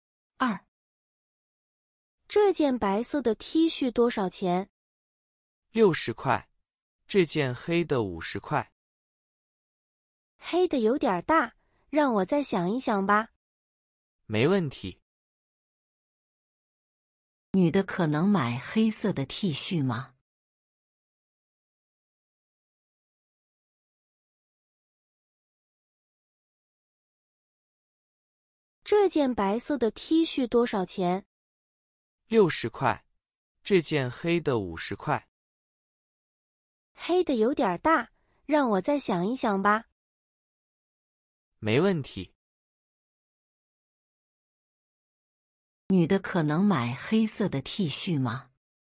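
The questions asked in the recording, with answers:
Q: 女的可能买黑色的 T 恤吗?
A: 不太可能,黑的有点大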